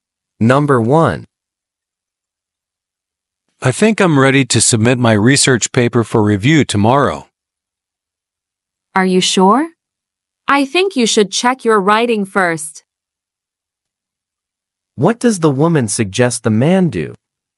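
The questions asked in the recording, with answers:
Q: What does the woman suggest the man do?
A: Check his writing before submitting the paper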